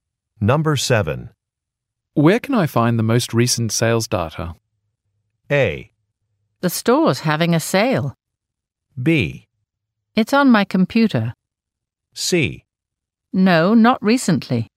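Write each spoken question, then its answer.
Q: Where can I find the most recent sales data?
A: B: It's on my computer.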